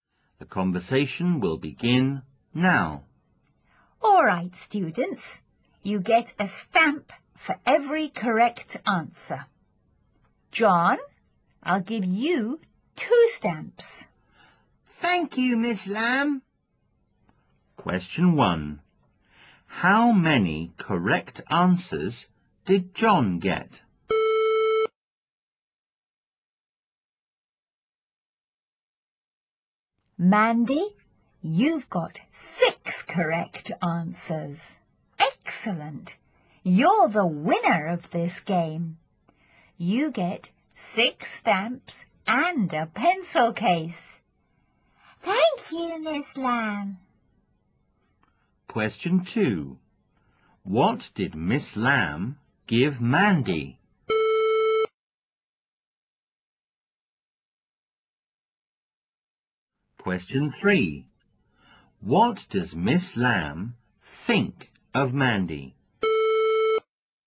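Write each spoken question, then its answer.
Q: What did Miss Lam give Mandy?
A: 6 stamps and a pencil case

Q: What does Miss Lam think of Mandy?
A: She is excellent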